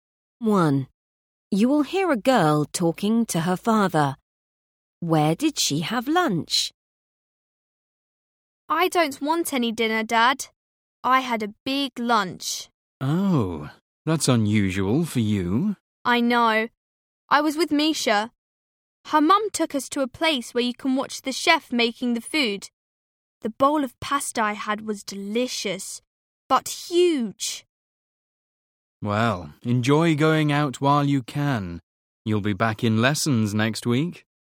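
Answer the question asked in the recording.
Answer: at a restaurant where you can watch the chef cook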